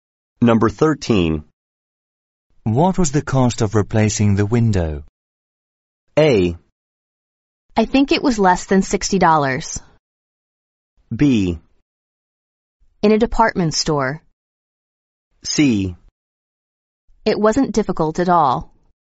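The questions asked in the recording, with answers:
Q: What was the cost of replacing the window?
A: A: I think it was less than $60.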